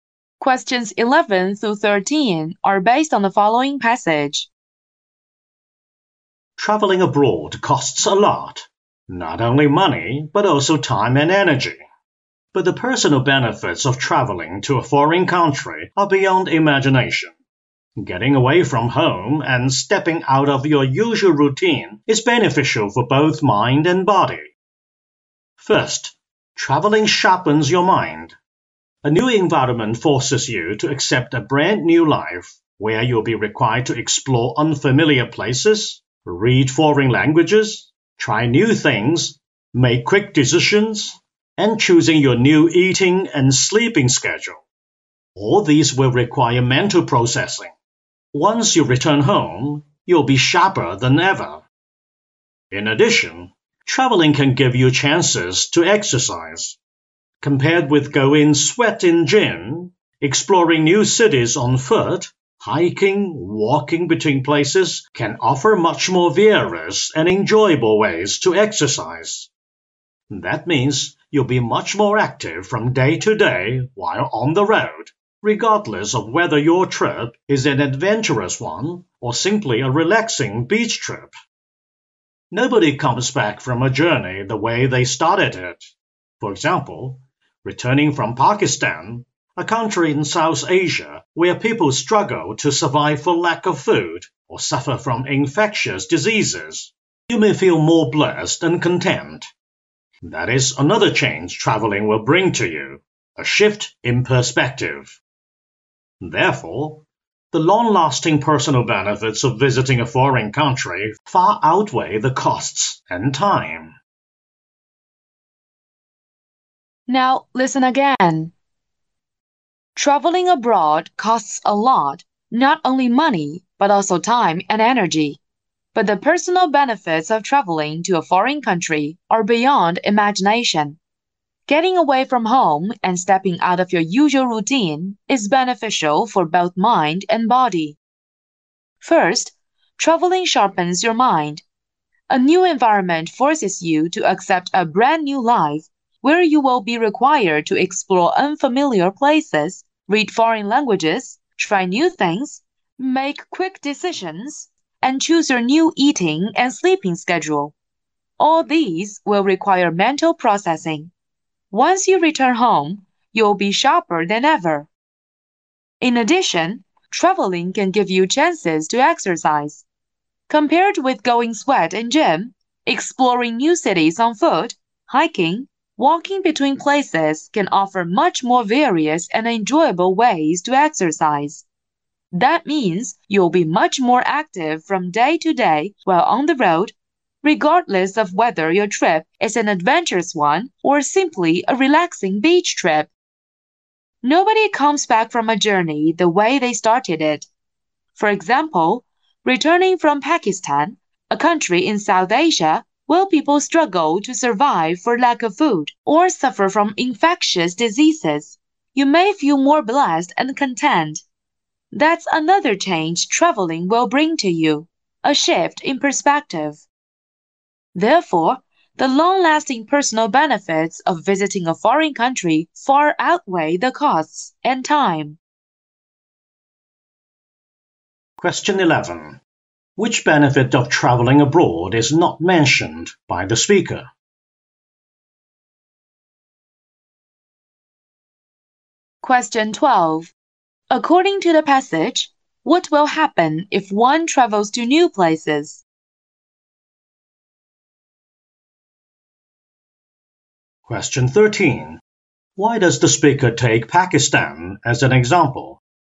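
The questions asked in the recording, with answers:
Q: Why does the speaker take Pakistan as an example?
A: To show how traveling changes your perspective.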